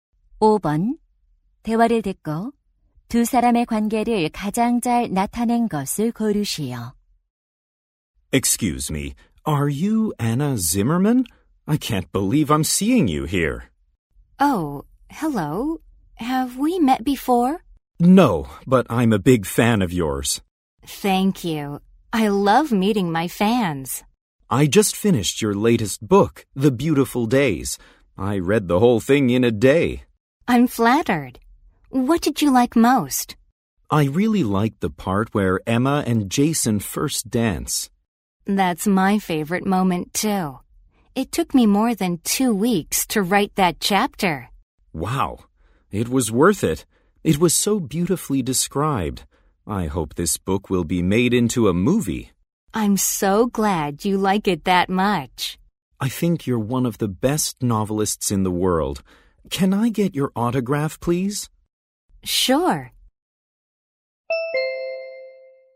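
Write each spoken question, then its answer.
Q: 대화를 듣고 두 사람의 관계를 가장 잘 나타낸 것을 고르시오.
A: 독자(팬) - 소설가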